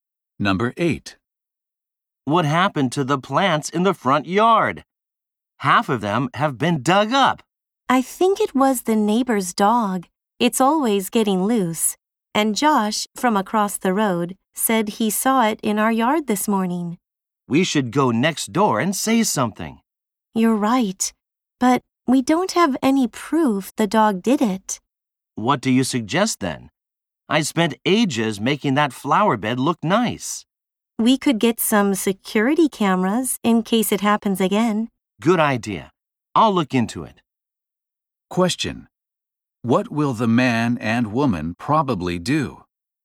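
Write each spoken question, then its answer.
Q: What will the man and woman probably do?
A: Get security cameras.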